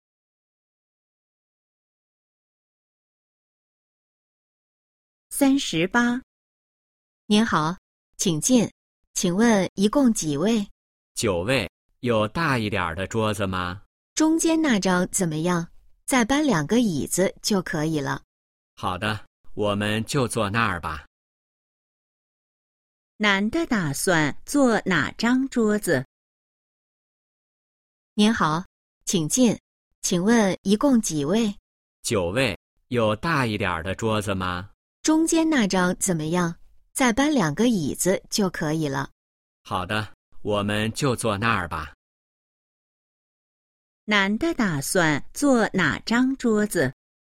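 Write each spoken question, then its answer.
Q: 男的打算坐哪张桌子?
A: 中间那张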